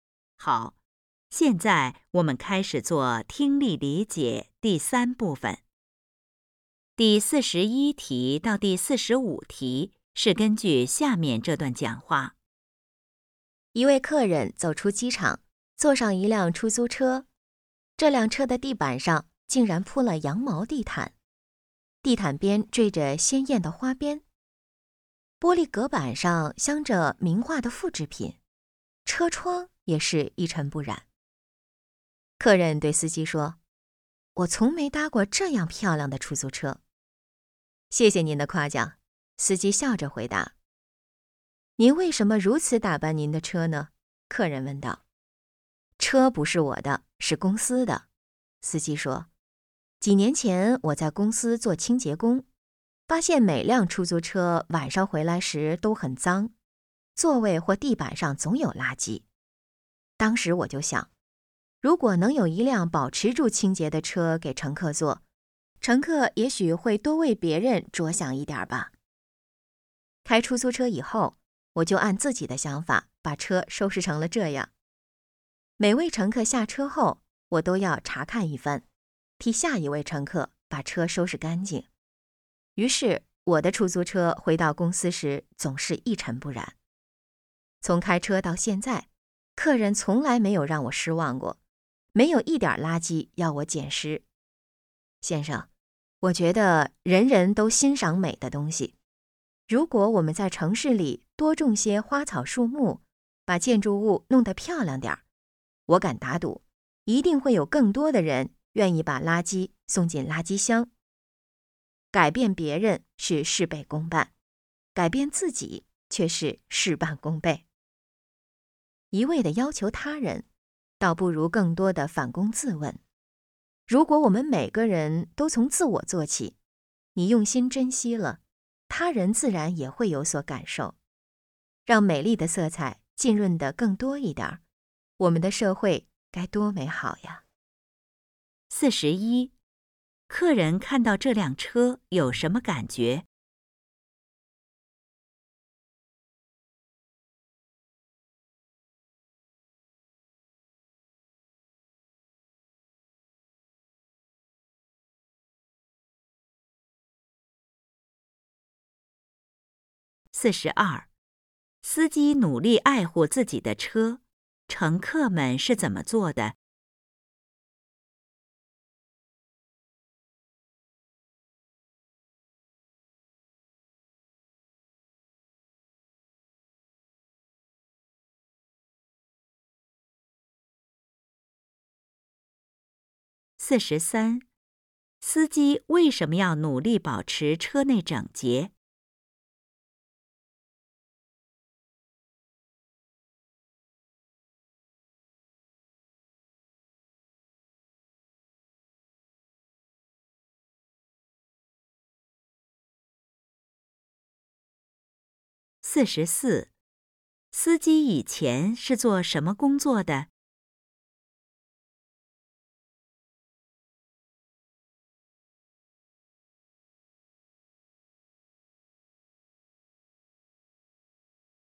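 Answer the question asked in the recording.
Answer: 在公司做清洁工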